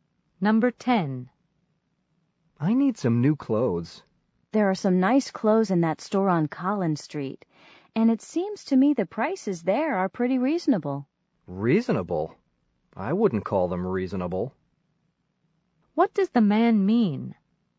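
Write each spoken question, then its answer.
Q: What does the man mean?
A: The prices in that store are high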